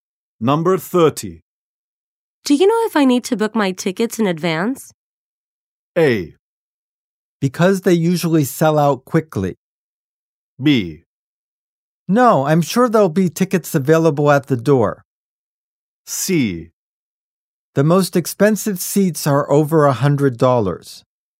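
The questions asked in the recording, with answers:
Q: Do you know if I need to book my tickets in advance?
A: B: No, I'm sure there'll be tickets available at the door.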